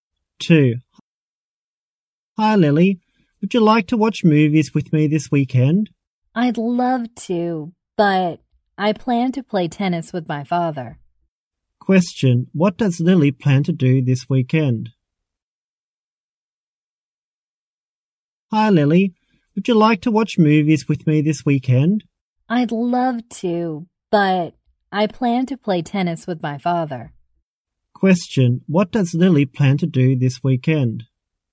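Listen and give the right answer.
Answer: Play tennis with her father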